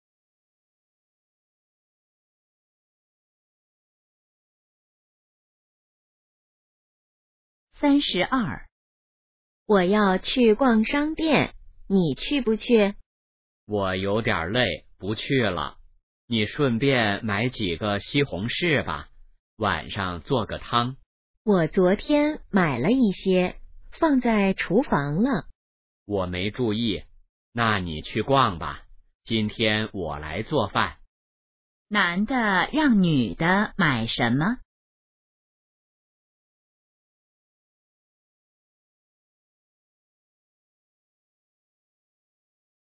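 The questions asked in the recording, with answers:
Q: 男的让女的买什么?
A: 西红柿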